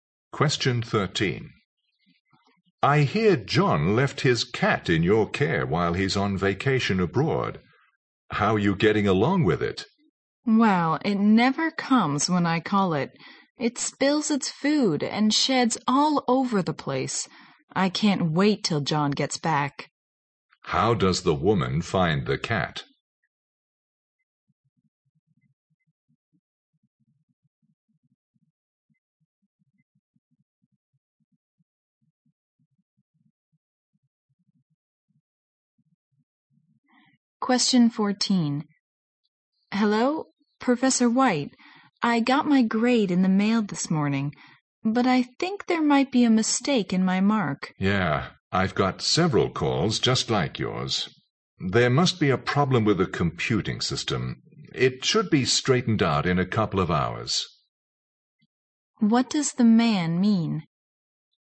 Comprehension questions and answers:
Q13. How does the woman find the cat?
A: A real nuisance.

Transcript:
M: I hear John left his cat in your care while he's on vacation abroad. How are you getting along with it?
W: Well, it never comes when I call it. It spills its food and sheds all over the place. I can't wait till John gets back.
Q: How does the woman find the cat?
W: Hello, Professor White, I got my grade in the mail this morning, but I think there might be a mistake in my mark.
M: Yeah, I've got several calls, just like yours, there must be a problem with the computing system. It should be straightened out in a couple of hours.
Q: What does the man mean?

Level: 六级